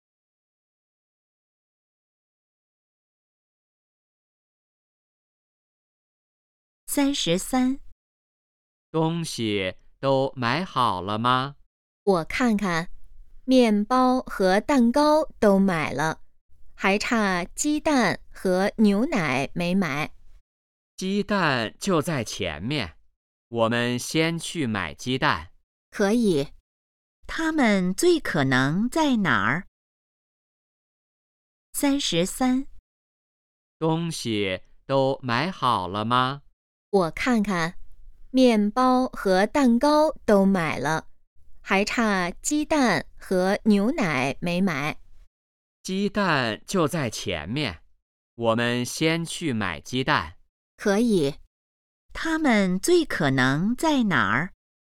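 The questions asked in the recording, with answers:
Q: 他们最可能在哪儿?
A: 超市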